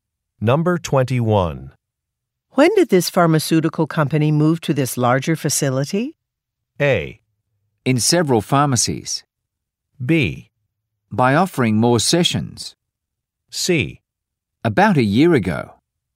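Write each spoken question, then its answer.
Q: When did this pharmaceutical company move to this larger facility?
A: C: About a year ago.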